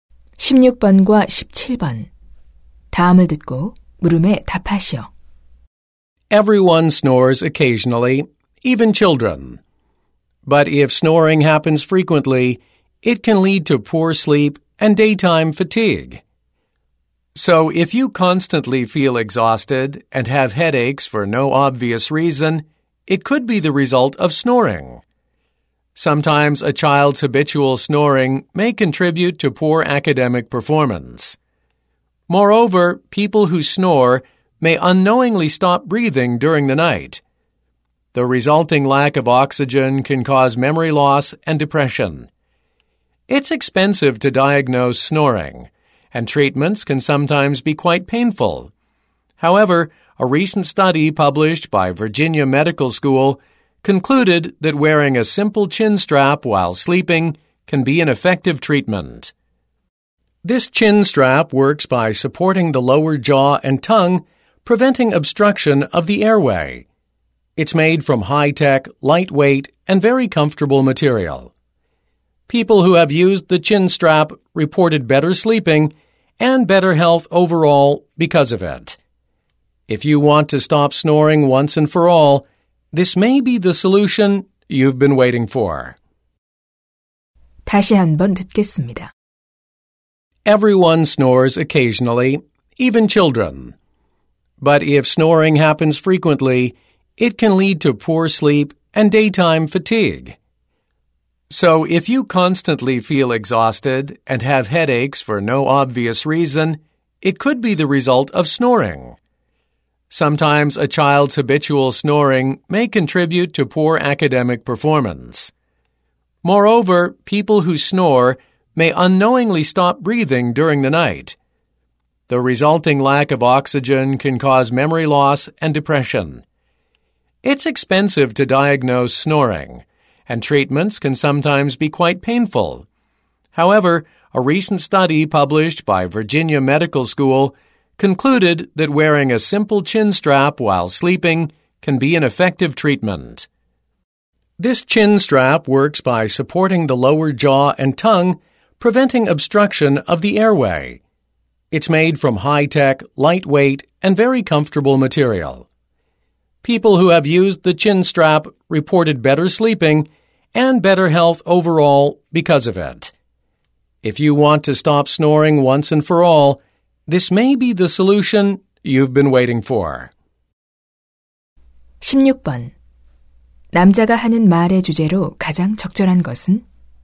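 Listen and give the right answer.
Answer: 코골이의 효과적 치료법인 턱끈 소개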